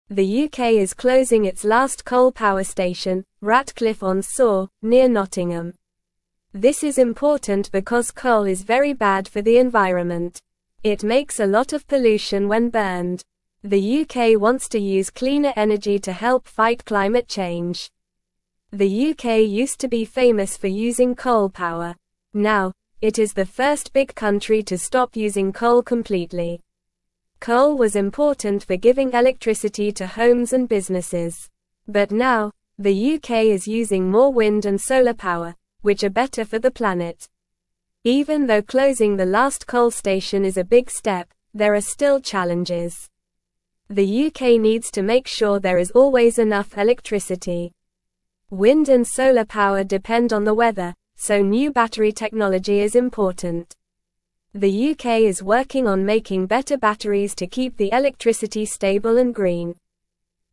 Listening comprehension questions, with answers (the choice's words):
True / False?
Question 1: Coal was important for giving electricity to homes and businesses.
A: True

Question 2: The UK is now using more wind and solar power, which are better for the planet.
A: True

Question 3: Now, the UK is the first big country to stop using coal completely.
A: True

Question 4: Coal is bad for the environment because it makes a lot of pollution when burned.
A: True

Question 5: The UK is not closing its last coal power station near Nottingham.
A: False

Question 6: The UK used to be infamous for using coal power.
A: False

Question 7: The UK is not working on making better batteries to keep the electricity stable and green.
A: False

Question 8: The UK is not interested in using cleaner energy to help fight climate change.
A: False

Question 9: The UK is closing its last (1)______ power (2)______, Ratcliffe-on-Soar, near Nottingham.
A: coal

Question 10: The UK is closing its last (1)______ power (2)______, Ratcliffe-on-Soar, near Nottingham.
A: station

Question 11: The UK (3)______ to use cleaner energy to help (4)______ climate change.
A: wants

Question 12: The UK (3)______ to use cleaner energy to help (4)______ climate change.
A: fight

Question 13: The UK used to be famous for (5)______ coal power.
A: using

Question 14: (6)______ was important for giving electricity to homes and businesses.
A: Coal

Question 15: Even though (7)______ the (8)______ coal station is a big (9)______, there are still challenges.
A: closing

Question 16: Even though (7)______ the (8)______ coal station is a big (9)______, there are still challenges.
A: last

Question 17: Even though (7)______ the (8)______ coal station is a big (9)______, there are still challenges.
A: step

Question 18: The UK needs to make sure there is always enough (10)______.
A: electricity

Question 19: Wind and solar power depend on the weather, so new (11)______ technology is important.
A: battery

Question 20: The UK is (12)______ on making better batteries to keep the electricity stable and green.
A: working

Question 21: Why is the UK closing its last coal power station?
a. Coal is cheap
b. Coal is bad for the environment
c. Coal is good for the environment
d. Coal is easy to find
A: Coal is bad for the environment

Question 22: What is the UK using more of instead of coal for energy?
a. Oil and gas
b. Nuclear power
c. Wind and solar power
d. Coal from other countries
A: Wind and solar power

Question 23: What is a challenge the UK faces with using wind and solar power?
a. Making sure there is always enough electricity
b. Making sure coal is used more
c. Making sure there is less pollution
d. Making sure there is more rain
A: Making sure there is always enough electricity

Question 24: What is the UK working on to keep electricity stable and green?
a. More coal power stations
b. More pollution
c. More wind turbines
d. Better batteries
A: Better batteries

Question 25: What was coal important for in the UK?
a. Making the air cleaner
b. Helping the environment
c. Giving electricity to homes and businesses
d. Producing less pollution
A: Giving electricity to homes and businesses

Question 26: Which country is the first big country to stop using coal completely?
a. China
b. USA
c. Russia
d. The UK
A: The UK

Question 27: What is the UK trying to fight by using cleaner energy?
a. Climate change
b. Pollution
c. More coal power stations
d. More wind turbines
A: Climate change

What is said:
The UK is closing its last coal power station, Ratcliffe-on-Soar, near Nottingham. This is important because coal is very bad for the environment. It makes a lot of pollution when burned. The UK wants to use cleaner energy to help fight climate change.
The UK used to be famous for using coal power. Now, it is the first big country to stop using coal completely. But now, the UK is using more wind and solar power, which are better for the planet.
Even though closing the last coal station is a big step, there are still challenges. The UK needs to make sure there is always enough electricity. Wind and solar power depend on the weather, so new battery technology is important. The UK is working on making better batteries to keep the electricity stable and green.

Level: Level 2